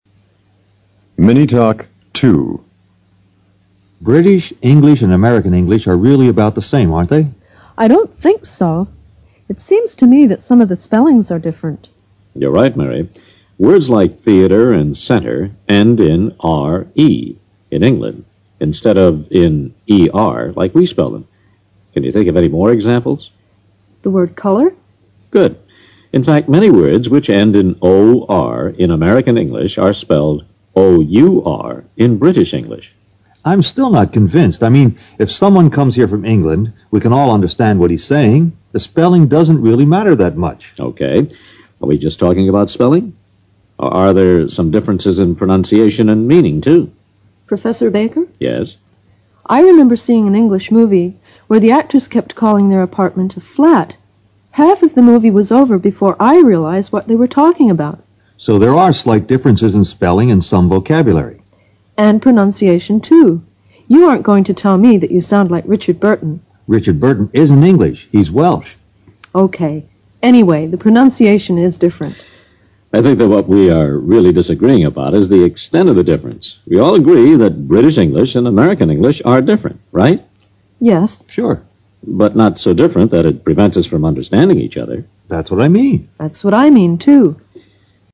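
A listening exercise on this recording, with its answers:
Listen carefully to this mini talk in order to understand and remember what the speaker says. (Please, play the mini talk audio only once). Then, listen to each question below and choose the best alternative for the answers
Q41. QUESTION # 41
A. Center.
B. Centre.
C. Centr.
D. Centere.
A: Centre.

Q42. QUESTION # 42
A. A smooth surface.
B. An actor.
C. An apartment.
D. A movie.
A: An apartment.

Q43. QUESTION # 43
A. That British English and American English are the same.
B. That British English and American English are so different that Americans cannot understand Englishmen when they speak.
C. That British English and American English have different spelling and vocabulary but the same pronunciation.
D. That British English and American English have slightly different spelling, vocabulary and pronunciation, but Americans and Englishmen still understand each other.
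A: That British English and American English have slightly different spelling, vocabulary and pronunciation, but Americans and Englishmen still understand each other.

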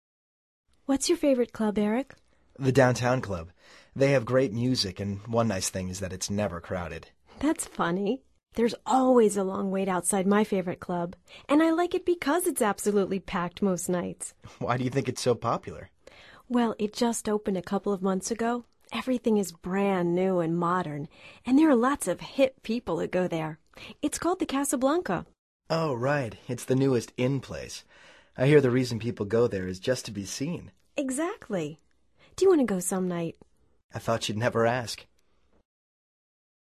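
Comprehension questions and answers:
Activity 86: Basándote en los comentarios anteriores, selecciona las opciones más adecuadas para cada oración. Verifica luego las respuestas correctas.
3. Their conversation is about ...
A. The Downtown Club.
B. The Casablanca Club.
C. popular dance clubs.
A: popular dance clubs.

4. Why does Ann like The Casablanca?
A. Because it is never crowded.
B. Because it is usually packed.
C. Because it is empty most nights.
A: Because it is usually packed.

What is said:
What's your favorite club, Erik?
They have great music, and one nice thing is that it's never crowded.
That's funny. There's always a long wait outside my favorite club. And I like it because it's absolutely packed most nights.
Why do you think it's so popular?
Well, it just opened a couple of months ago, everything is brand new and modern, and there are lots of "hip" people who go there. It's called The Casablanca.
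Oh, right. It's the newest "in" place. I hear the reason people go there is just to be seen.
Exactly! Do you want to go some night?
I thought you'd never ask!

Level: Nivel Avanzado

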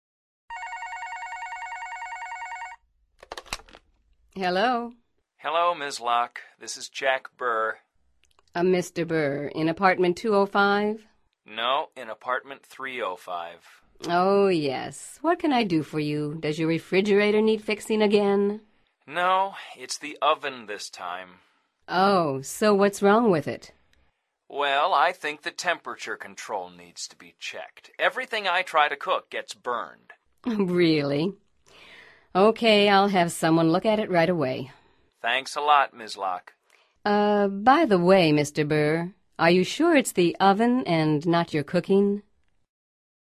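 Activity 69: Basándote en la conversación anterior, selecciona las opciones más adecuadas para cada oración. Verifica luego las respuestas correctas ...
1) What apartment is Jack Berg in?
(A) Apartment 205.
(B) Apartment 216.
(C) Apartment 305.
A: Apartment 305.

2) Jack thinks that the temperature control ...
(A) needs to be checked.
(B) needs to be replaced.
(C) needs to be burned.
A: needs to be checked.

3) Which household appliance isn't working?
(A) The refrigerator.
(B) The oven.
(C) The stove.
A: The oven.

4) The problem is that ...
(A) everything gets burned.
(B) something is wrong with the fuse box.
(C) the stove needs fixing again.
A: everything gets burned.

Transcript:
No, in Apartment 305.
Oh, yes. What can I do for you? Does your refrigerator need fixing again?
No, it's the oven this time.
Oh, so what's wrong with it?
Well, I think the temperature control needs to be checked. 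Everything I try to cook gets burned.
Really? OK, I'll have someone look at it right away.
Thanks a lot, Ms. Lock.
Uh, by the way, Mr. Berg, are you sure it's the oven and not your cooking?

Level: Nivel Avanzado

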